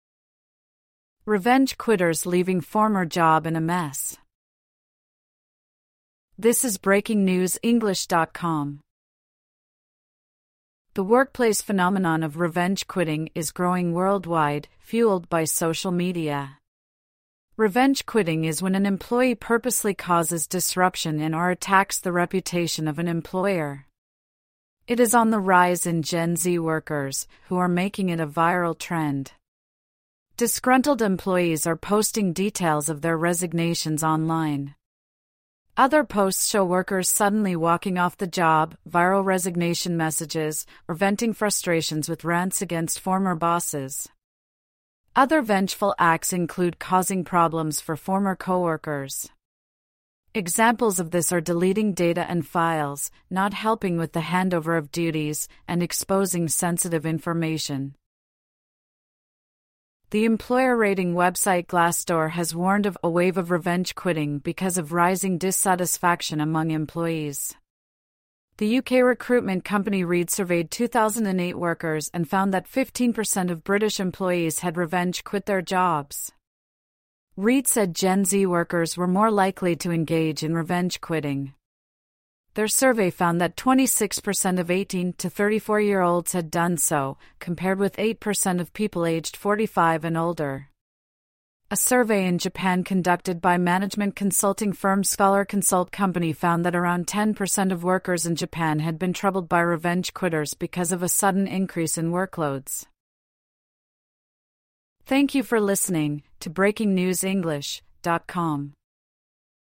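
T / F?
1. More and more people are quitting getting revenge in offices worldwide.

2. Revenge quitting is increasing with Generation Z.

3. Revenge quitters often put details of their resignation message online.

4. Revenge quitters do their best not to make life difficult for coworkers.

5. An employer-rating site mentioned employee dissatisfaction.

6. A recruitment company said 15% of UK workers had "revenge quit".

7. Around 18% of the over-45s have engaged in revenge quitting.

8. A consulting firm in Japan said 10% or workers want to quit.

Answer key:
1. T
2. T
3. T
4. F
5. T
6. T
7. F
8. F

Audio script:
'Revenge quitters' leaving former job in a mess
The workplace phenomenon of "revenge quitting" is growing worldwide, fuelled by social media. Revenge quitting is when an employee purposely causes disruption in or attacks the reputation of an employer. It is on the rise in Gen Z workers, who are making it a viral trend. 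Disgruntled employees are posting details of their resignations online. Other posts show workers suddenly walking off the job, viral resignation messages, or venting frustrations with rants against former bosses. Other vengeful acts include causing problems for former co-workers. Examples of this are deleting data and files, not helping with the handover of duties, and exposing sensitive information.
The employer-rating website Glassdoor has warned of "a wave of revenge quitting" because of rising dissatisfaction among employees. The UK recruitment company Reed surveyed 2,008 workers and found that 15 per cent of British employees had "revenge quit" their jobs. Reed said Gen Z workers were more likely to engage in revenge quitting. Their survey found that 26 per cent of 18- to 34-year-olds had done so, compared with 8 per cent of people aged 45 and older. A survey in Japan conducted by management consulting firm Scholar Consult Co. 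found that around 10 per cent of workers in Japan had been troubled by revenge quitters because of a sudden increase in workloads.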